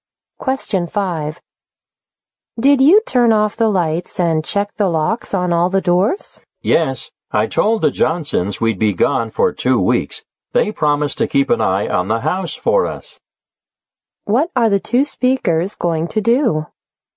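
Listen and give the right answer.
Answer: Go away on a trip for two weeks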